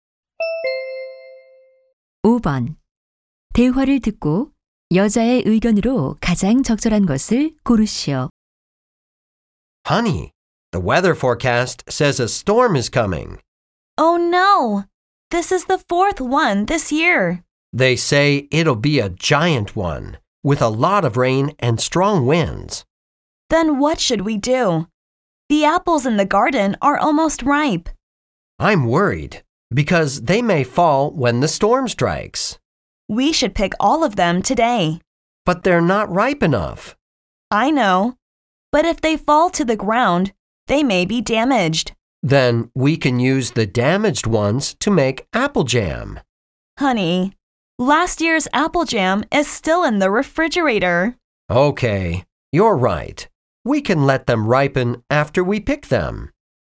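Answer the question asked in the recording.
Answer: 폭풍이 오기 전에 사과를 모두 따야 한다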